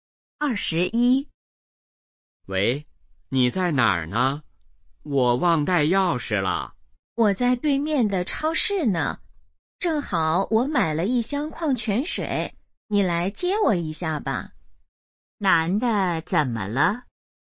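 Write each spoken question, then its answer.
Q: 男的怎么了?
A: 忘带钥匙了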